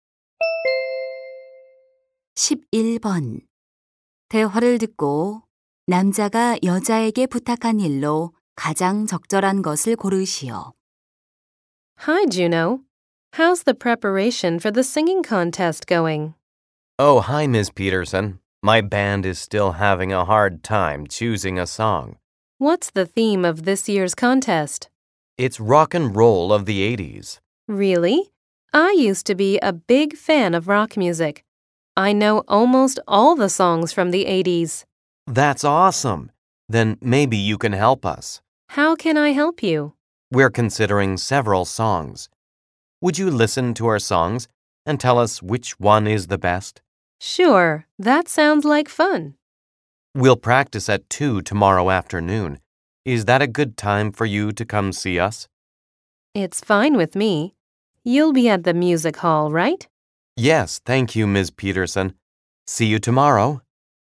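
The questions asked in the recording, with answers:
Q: 대화를 듣고 남자가 여자에게 부탁한 일로 가장 적절한 것을 고르시오.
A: 밴드의 노래를 듣고 가장 좋은 곡 골라 주기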